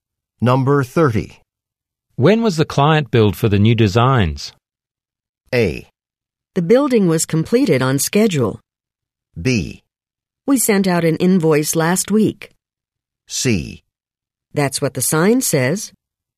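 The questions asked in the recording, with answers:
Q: When was the client billed for the new designs?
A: B: We sent out an invoice last week.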